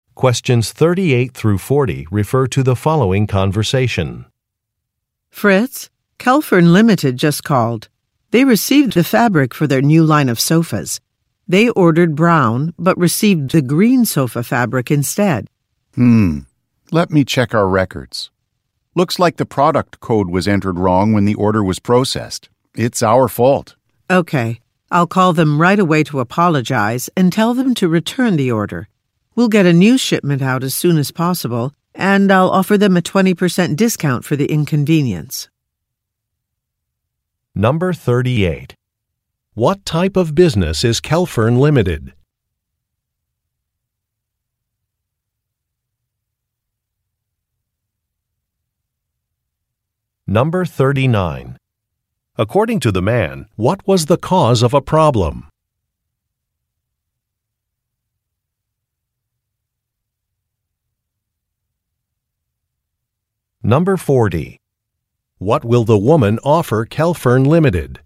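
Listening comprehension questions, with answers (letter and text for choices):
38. What type of business is Kelfern Limited?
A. A furniture company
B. An automobile manufacturer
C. A restaurant supply store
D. An architectural design firm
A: A. A furniture company

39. According to the man, what was the cause of a problem?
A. A delivery was late.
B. A part was missing.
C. A product was damaged.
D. A code was entered incorrectly.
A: D. A code was entered incorrectly.

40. What will the woman offer Kelfern Limited?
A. Free installation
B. Next-day delivery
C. A discount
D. A full refund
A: C. A discount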